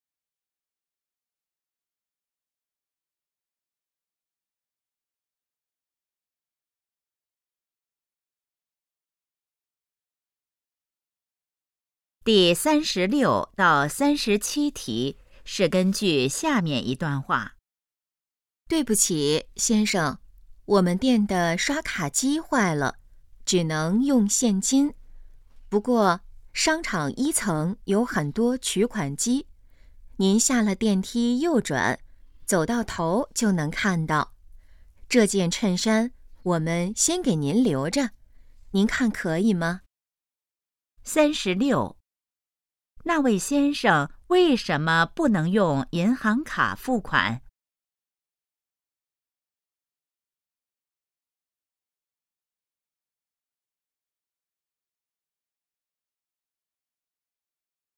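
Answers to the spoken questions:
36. 刷卡机坏了
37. 商场1层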